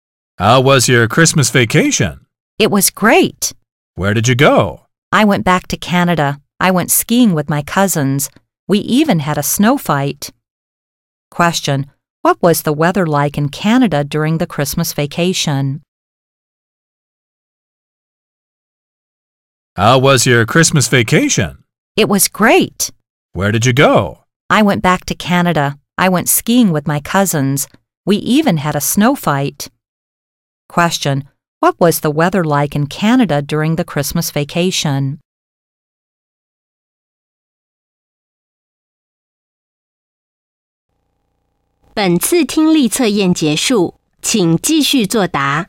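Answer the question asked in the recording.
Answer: Cold and snowy.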